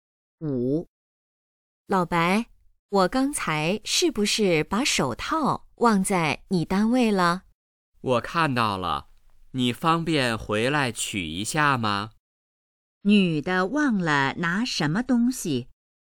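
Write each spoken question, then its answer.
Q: 女的忘了拿什么东西?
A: 手套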